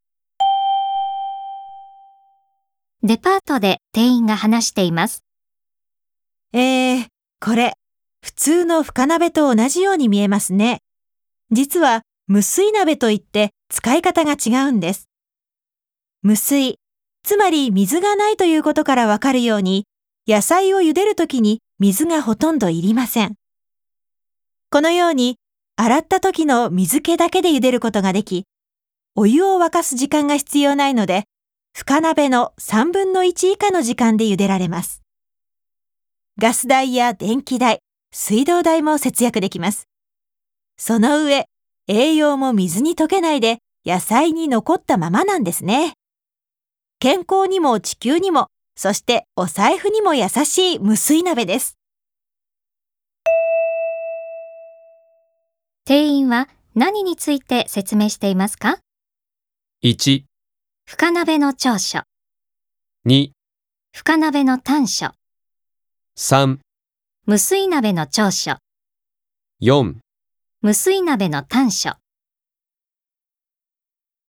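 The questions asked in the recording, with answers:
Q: 店員は何について説明していますか?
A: 3: 無水鍋の長所。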